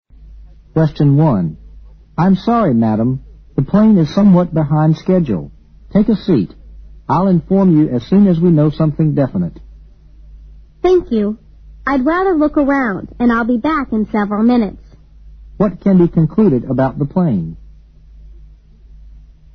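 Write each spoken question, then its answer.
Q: What can be concluded about the plane?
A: It is delayed (behind schedule).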